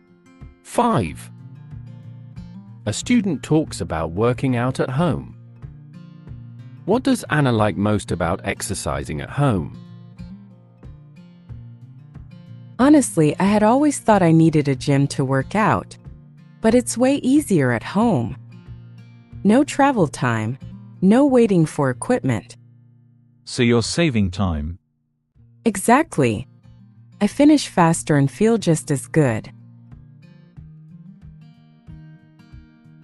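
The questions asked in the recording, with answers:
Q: What does Anna like most about exercising at home?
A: It saves time.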